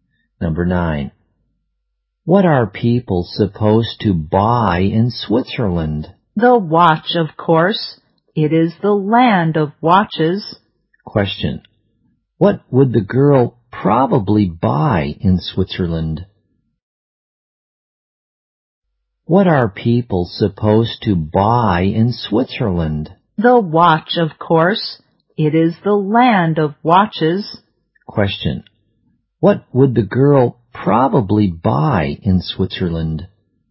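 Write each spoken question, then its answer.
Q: Question. What would the girl probably buy in Switzerland?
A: A watch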